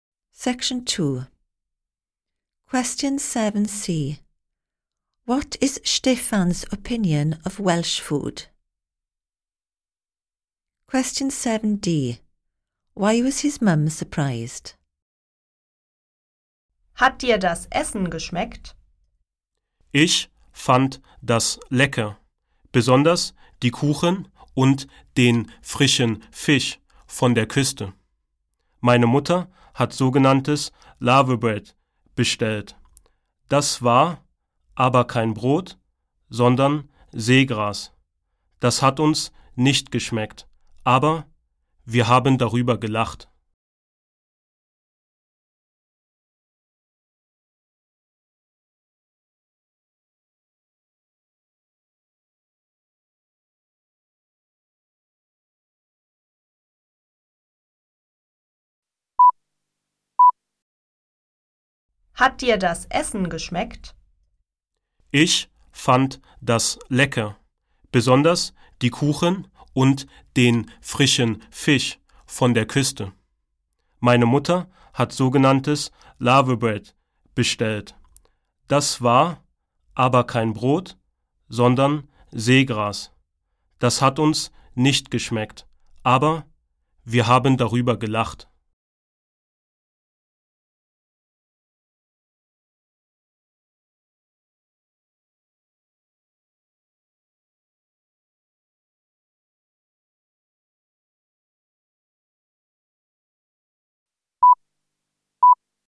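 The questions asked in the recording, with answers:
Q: What is Stefan's opinion of Welsh food?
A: Delicious, especially the cakes and fresh fish

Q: Why was his mum surprised?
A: The laverbread was not bread but seaweed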